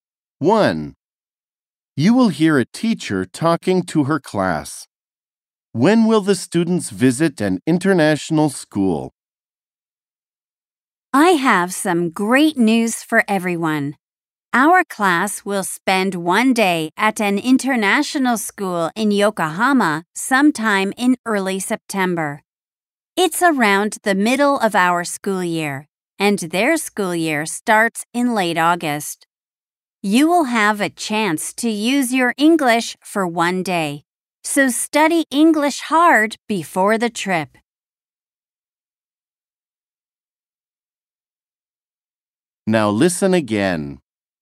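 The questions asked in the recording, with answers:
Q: When will the students visit an international school?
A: Early September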